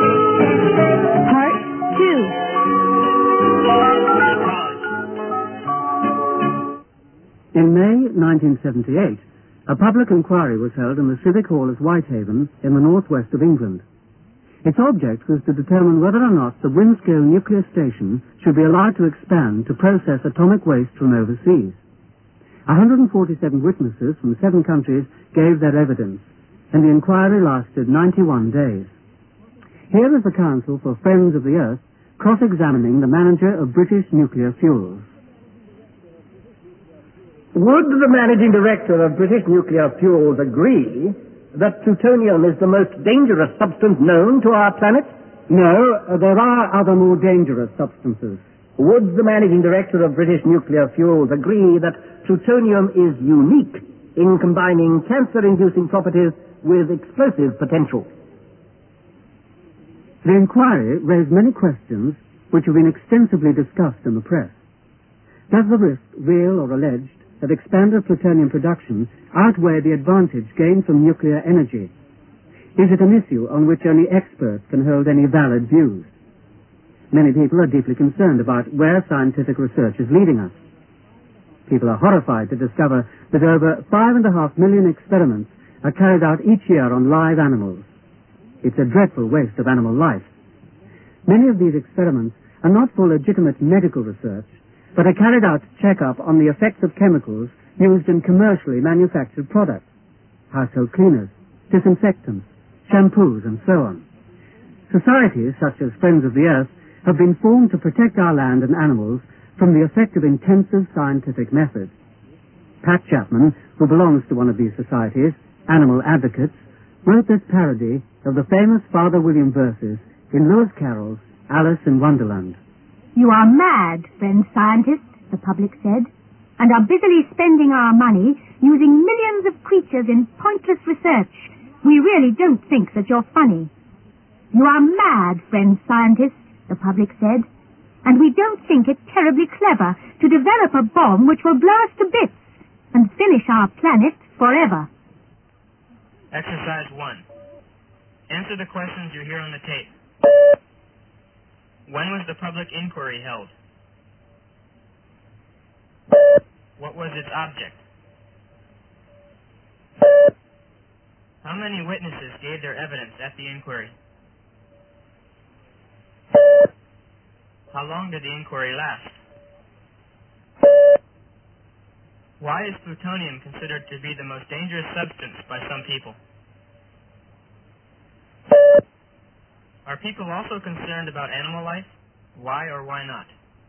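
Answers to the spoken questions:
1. In May 1978
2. To determine whether the Windscale nuclear station should be allowed to expand to process atomic waste from overseas
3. 147
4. 91 days
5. It combines cancer-inducing properties with explosive potential
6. Yes, over 5.5 million experiments are carried out each year on live animals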